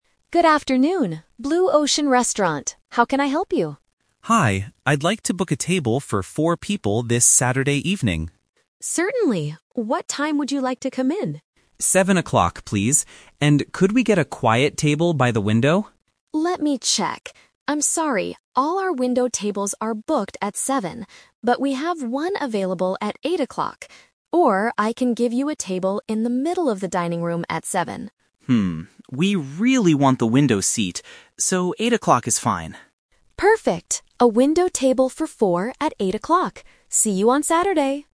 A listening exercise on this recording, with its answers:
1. What time is the customer's final reservation?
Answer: 8:00

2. Where does the customer want to sit?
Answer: By the window

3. Why does the customer agree to come at a different time?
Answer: Because he wants to get a window seat.